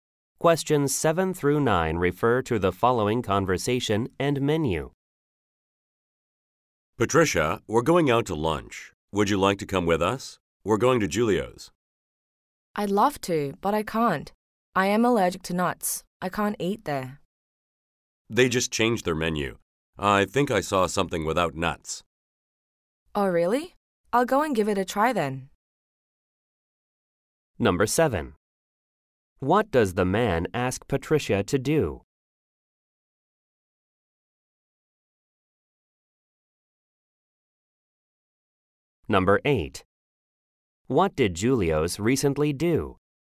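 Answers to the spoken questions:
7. Go out to lunch with them
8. Changed its menu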